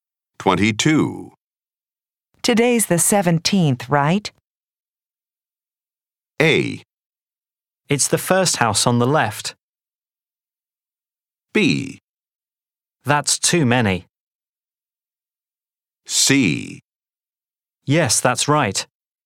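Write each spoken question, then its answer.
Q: Today's the 17th, right?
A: C: Yes, that's right.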